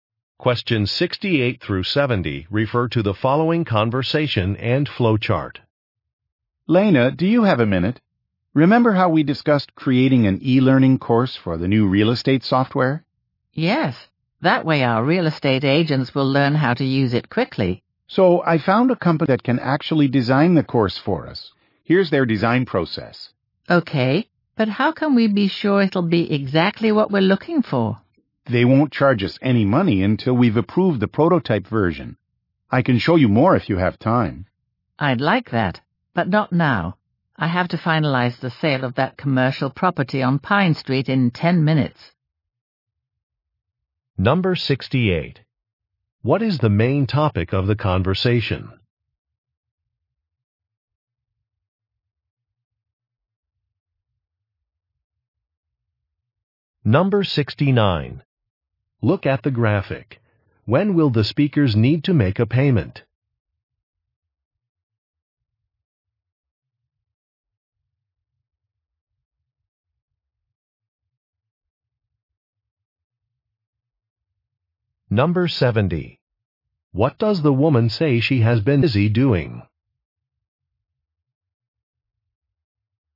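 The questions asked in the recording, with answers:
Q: What is the main topic of the conversation?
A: Creating an e-learning course for new software

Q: What does the woman say she has been busy doing?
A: Finalizing the sale of a commercial property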